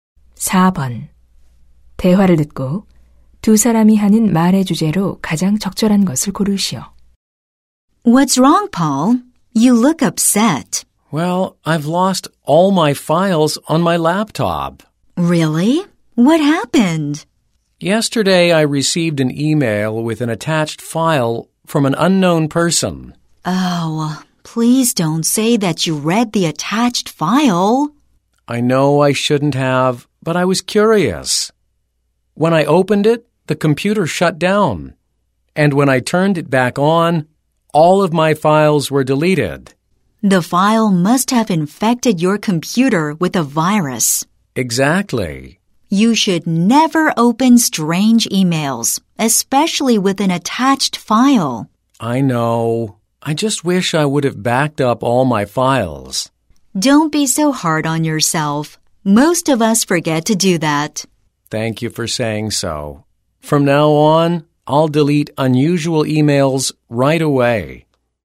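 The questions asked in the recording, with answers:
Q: 대화를 듣고 두 사람이 하는 말의 주제로 가장 적절한 것을 고르시오.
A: 모르는 사람이 보낸 첨부 파일 이메일을 열면 바이러스에 감염될 위험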